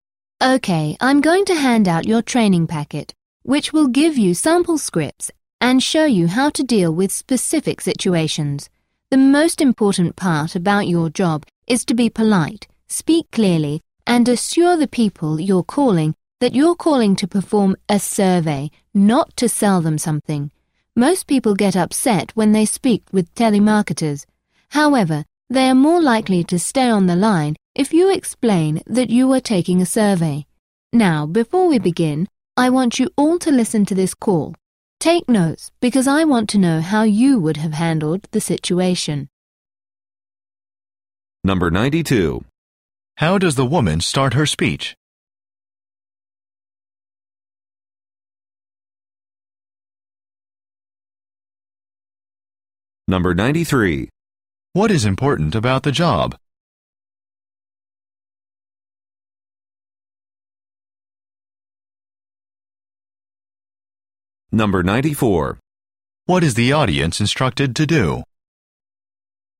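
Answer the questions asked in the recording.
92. By handing out the training packet
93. Being polite, speaking clearly, and assuring people it's a survey, not a sales call
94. Listen to a call and take notes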